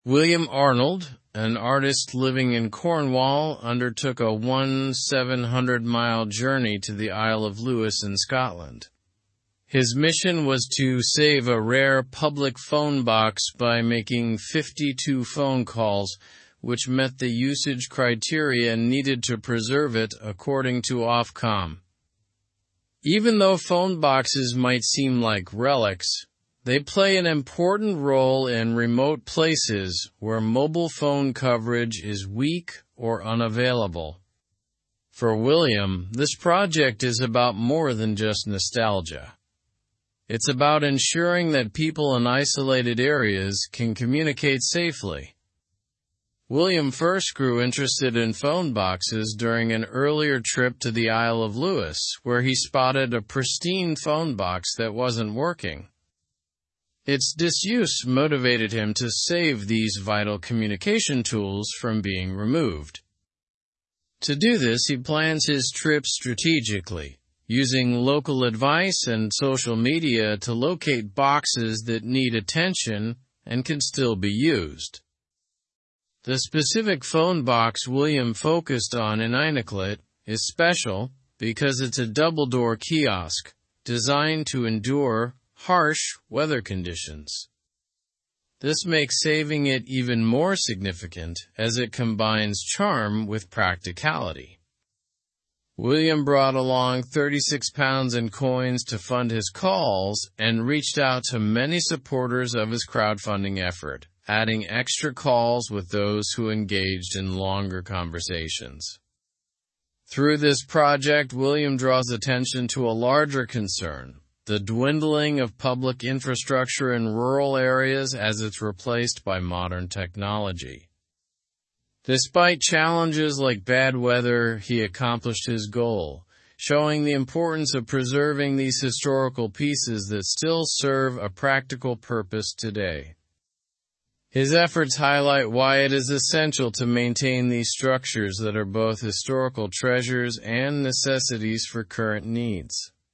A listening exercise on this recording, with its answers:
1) What was William Arnold's reason for visiting the Isle of Lewis?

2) How did William first become interested in phone boxes?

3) What makes the phone box in Einacleit unique?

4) How did William fund his phone calls during the trip?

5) What broader issue does William hope to address through his project?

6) What challenges did William face in his mission?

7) Why are phone boxes still important in certain remote areas?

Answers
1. William Arnold visited the Isle of Lewis to preserve a rare public phone box by making 52 calls.
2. William became interested after finding a non-working phone box during a previous visit to the Isle of Lewis.
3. The phone box in Einacleit is unique because it's a double-door kiosk built to withstand harsh weather.
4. William used £36 in coins to pay for his phone calls.
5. His project addresses the issue of disappearing public infrastructure in rural areas.
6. William faced challenges such as unruly weather and cold conditions.
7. Phone boxes remain important in remote areas because they offer crucial communication where mobile coverage is weak or unavailable.

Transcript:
William Arnold, an artist living in Cornwall, undertook a 1,700-mile journey to the Isle of Lewis in Scotland. His mission was to save a rare public phone box by making 52 phone calls, which met the usage criteria needed to preserve it according to Ofcom. Even though phone boxes might seem like relics, they play an important role in remote places where mobile phone coverage is weak or unavailable. For William, this project is about more than just nostalgia—it's about ensuring that people in isolated areas can communicate safely.
William first grew interested in phone boxes during an earlier trip to the Isle of Lewis, where he spotted a pristine phone box that wasn't working. Its disuse motivated him to save these vital communication tools from being removed. To do this, he plans his trips strategically, using local advice and social media to locate boxes that need attention and can still be used.
The specific phone box William focused on in Einacleit is special because it's a double-door kiosk designed to endure harsh weather conditions. This makes saving it even more significant, as it combines charm with practicality. William brought along £36 in coins to fund his calls and reached out to many supporters of his crowdfunding effort, adding extra calls with those who engaged in longer conversations.
Through this project, William draws attention to a larger concern: the dwindling of public infrastructure in rural areas as it's replaced by modern technology. Despite challenges like bad weather, he accomplished his goal, showing the importance of preserving these historical pieces that still serve a practical purpose today. His efforts highlight why it is essential to maintain these structures that are both historical treasures and necessities for current needs.

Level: Level 3